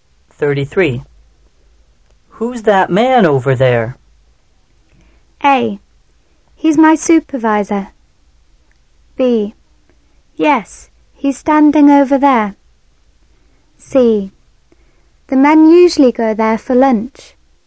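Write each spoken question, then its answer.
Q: Who's that man over there?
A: A: He's my supervisor.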